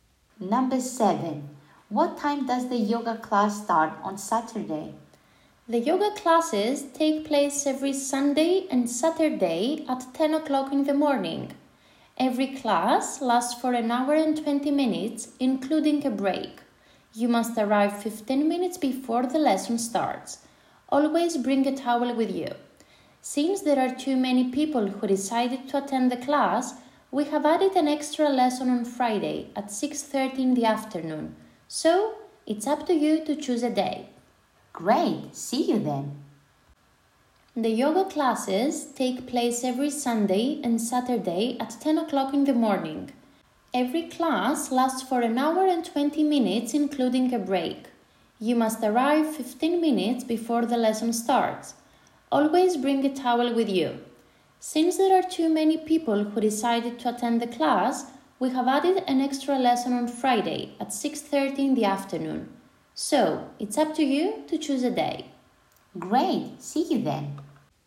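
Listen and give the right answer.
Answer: 10 o'clock in the morning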